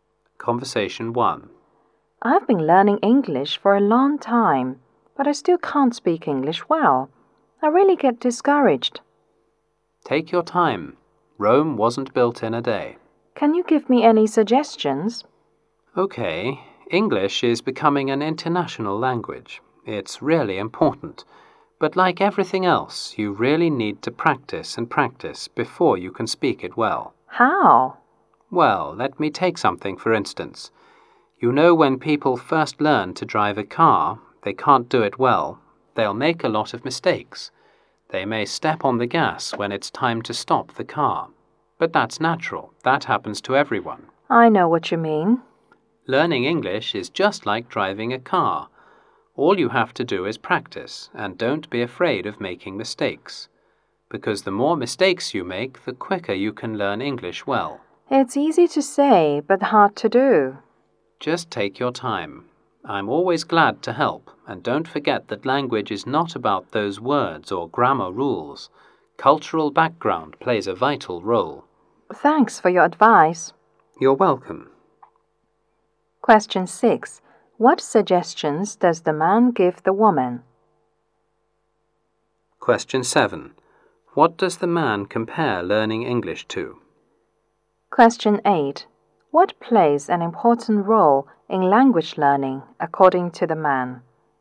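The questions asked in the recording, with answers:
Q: What suggestions does the man give the woman?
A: Practice a lot and don't be afraid of making mistakes

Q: What does the man compare learning English to?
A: Driving a car

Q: What plays an important role in language learning, according to the man?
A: Cultural background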